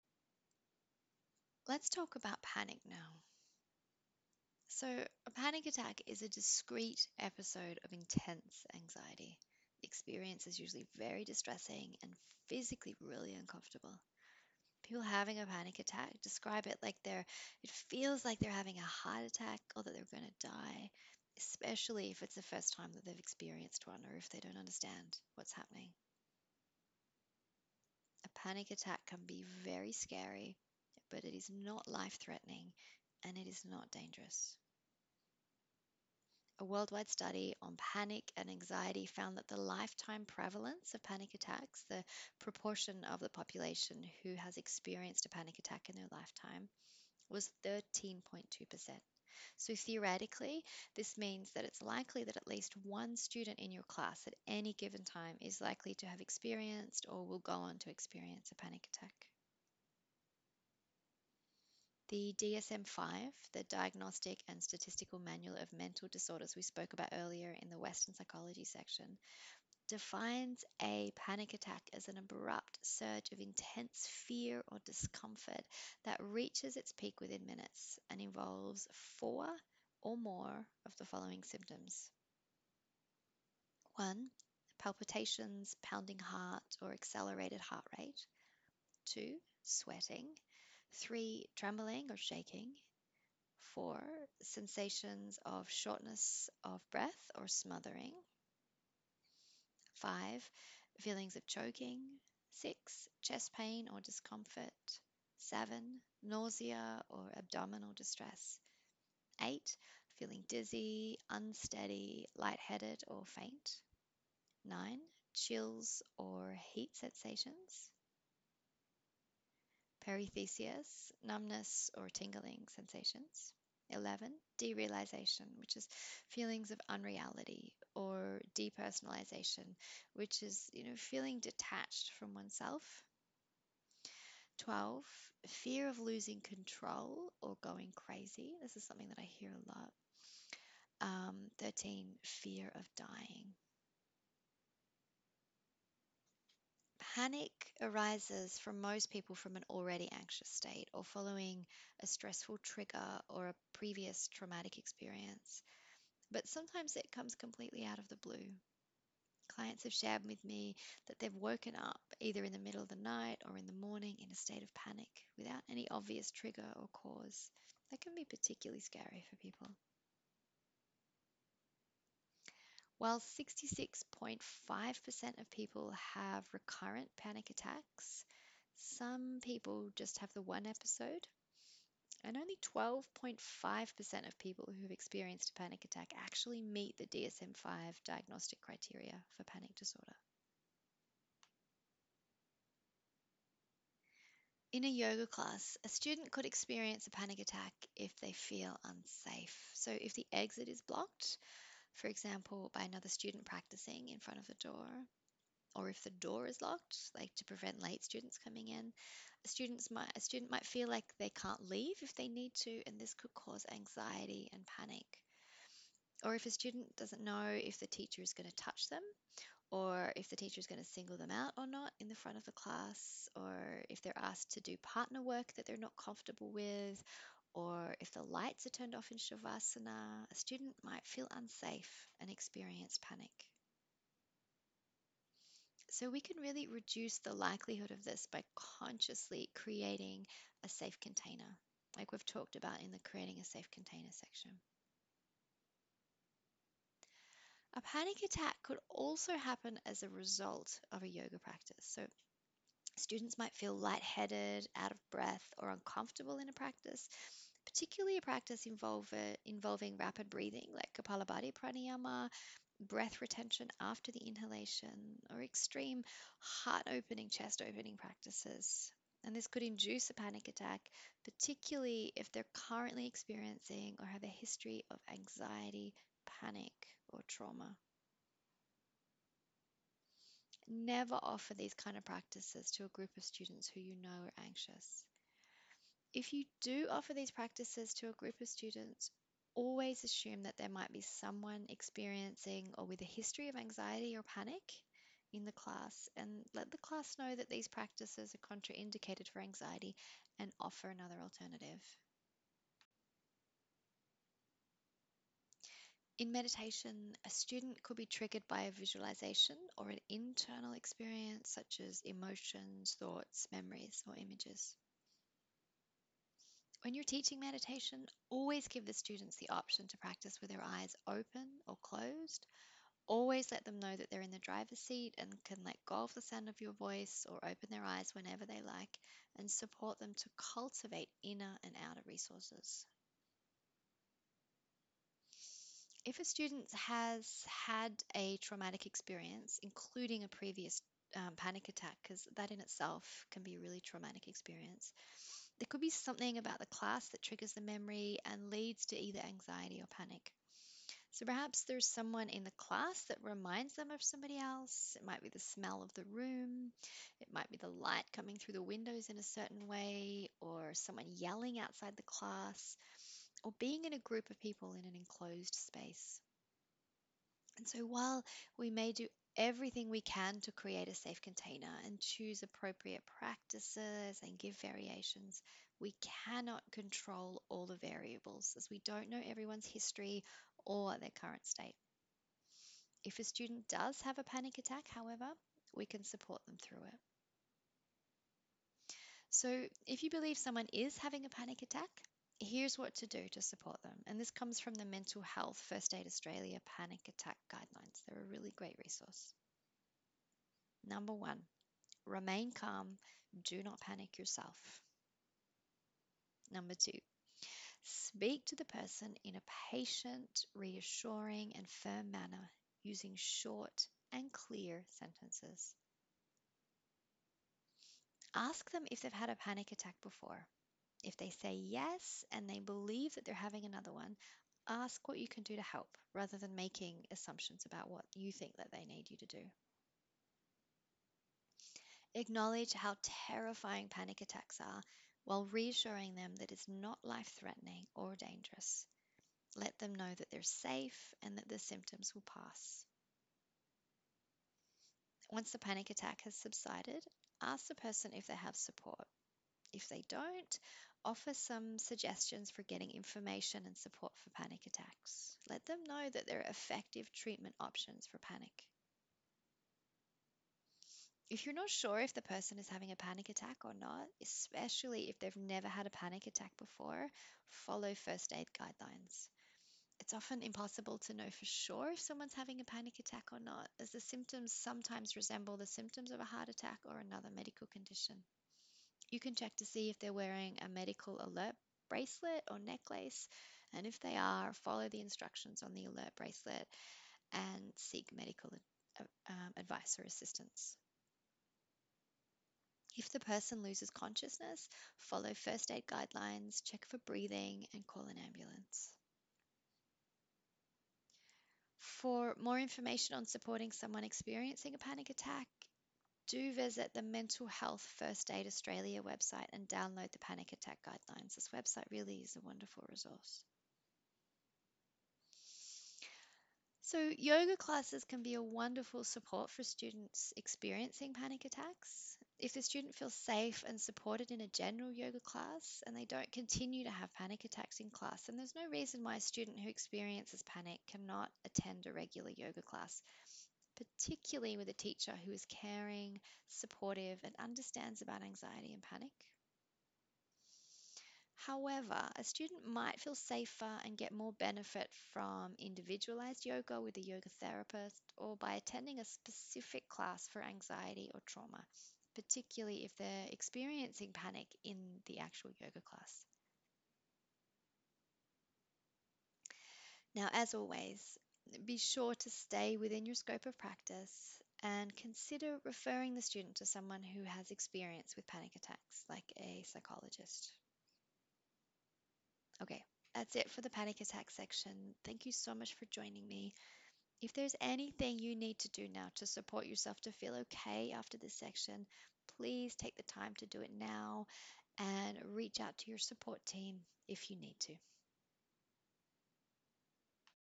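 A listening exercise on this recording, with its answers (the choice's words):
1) What is a panic attack?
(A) A discrete episode of intense anxiety that can be very scary, but is not life threatening or dangerous.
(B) A low mood.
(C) Being attacked by someone who is panicking.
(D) None of the above.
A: A discrete episode of intense anxiety that can be very scary, but is not life threatening or dangerous.

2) Why might a student have a panic attack in class?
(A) If they feel unsafe.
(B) As a result of a yogic practice like Kapālabhātī Prāṇāyāma, breath retention after the inhalation, or extreme 'heart opening' practices.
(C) Being triggered by a memory of a previous traumatic experience or panic attack.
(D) All of the above.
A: All of the above.

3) How could you support a student experiencing a panic attack?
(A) Remain calm yourself.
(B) Ask them if they have had a panic attack before, and if they say yes and they believe they are having another one, ask what you can do to help.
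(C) Acknowledge how terrifying panic attacks are, while reassuring them that they are not dangerous and that the symptoms will pass.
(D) All of the above.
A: All of the above.

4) If your student has the symptoms of a severe panic attack in your class, but they tell you they have never had a panic attack before and are worried that they are having a heart attack, what could you do?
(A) Reassure them that it is probably just a panic attack, and they should breathe through it.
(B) Follow first aid guidelines.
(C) Ask the whole class to make a circle around them and have a group hug.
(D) None of the above.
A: Follow first aid guidelines.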